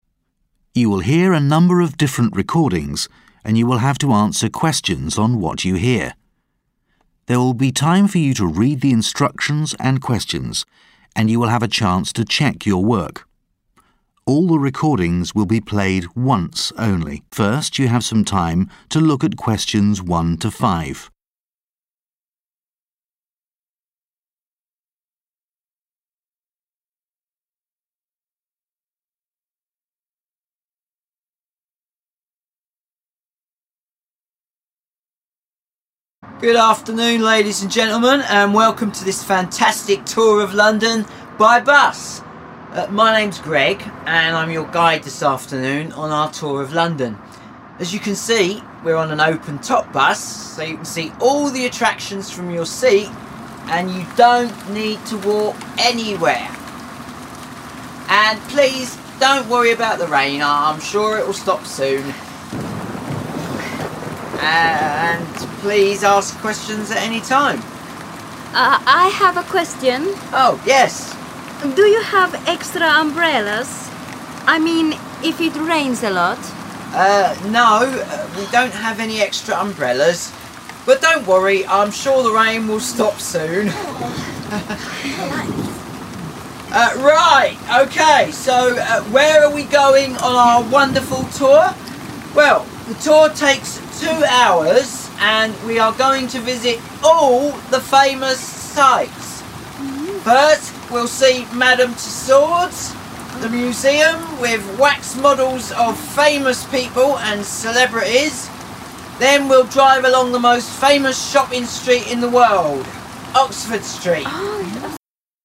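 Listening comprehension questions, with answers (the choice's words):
Questions 1 - 5 Choose the correct letter, A, B, C or D.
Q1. What type of bus is the tour being conducted on?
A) Double-decker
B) Open-top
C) Closed-top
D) Mini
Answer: Open-top

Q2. How does the tour guide provide comfort regarding the weather?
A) The tour will be conducted indoors.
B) Rain gear will be provided to all passengers.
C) The rain is expected to stop soon.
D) The tour route avoids areas prone to rain.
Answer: The rain is expected to stop soon.

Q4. How long does the tour last?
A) One hour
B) Three hours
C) Two hours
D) Two and a half hours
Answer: Two hours

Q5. What is the main purpose of mentioning Oxford Street in the conversation?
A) To highlight a famous shopping destination.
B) To warn about potential traffic delays.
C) To indicate the tour's end point.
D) To suggest an alternate route in case of rain.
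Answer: To highlight a famous shopping destination.

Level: THCS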